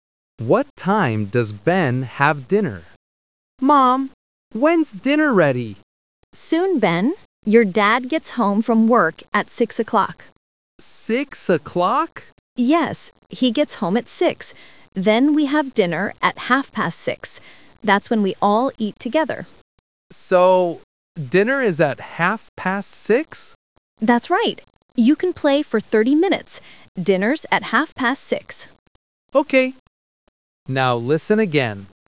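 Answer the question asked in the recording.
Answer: 6:30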